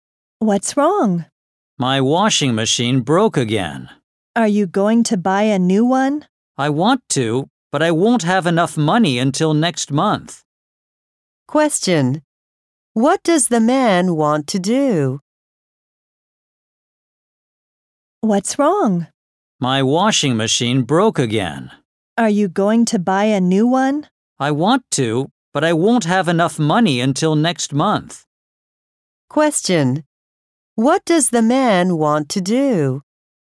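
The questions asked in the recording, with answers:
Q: What does the man want to do?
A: Buy a new washing machine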